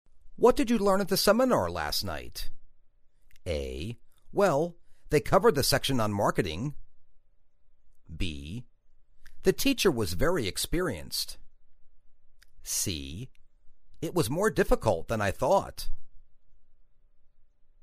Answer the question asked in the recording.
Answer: Well, they covered the section on marketing.